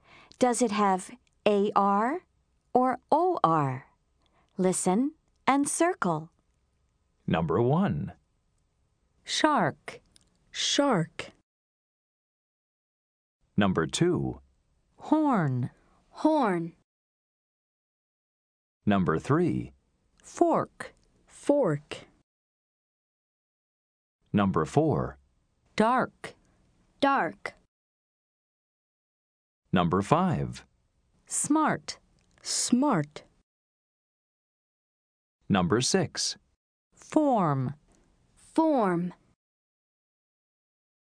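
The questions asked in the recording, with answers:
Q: Does it have AR or OR?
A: AR (shark)

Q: Does it have AR or OR?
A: OR (horn)

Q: Does it have AR or OR?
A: OR (fork)

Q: Does it have AR or OR?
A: AR (dark)

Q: Does it have AR or OR?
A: AR (smart)

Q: Does it have AR or OR?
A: OR (form)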